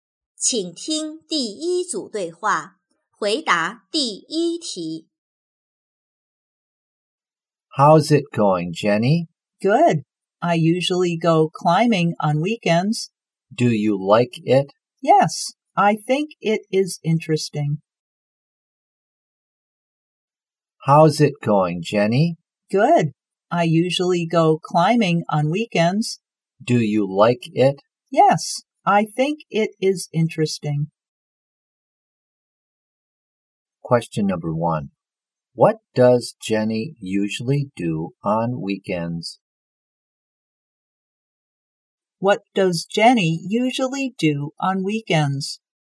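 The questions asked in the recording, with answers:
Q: What does Jenny usually do on weekends?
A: She goes climbing.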